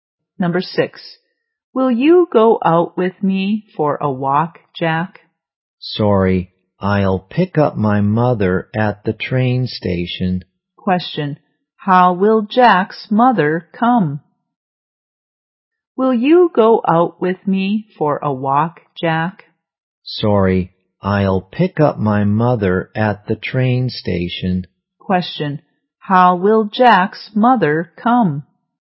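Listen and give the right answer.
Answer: By train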